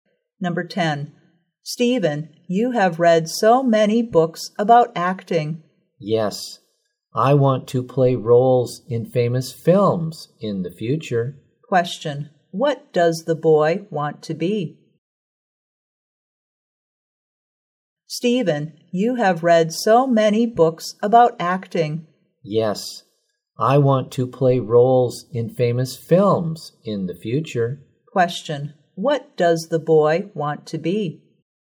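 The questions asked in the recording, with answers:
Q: Question. What does the boy want to be?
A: An actor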